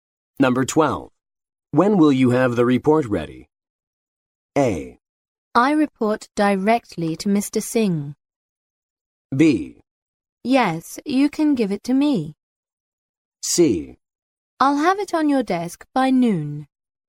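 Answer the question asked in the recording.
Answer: C: I'll have it on your desk by noon.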